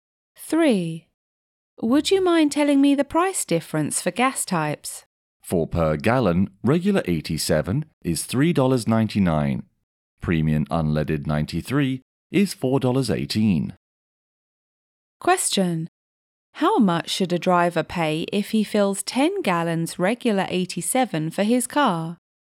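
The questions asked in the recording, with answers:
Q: How much should a driver pay if he fills 10 gallons regular 87 for his car?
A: $39.90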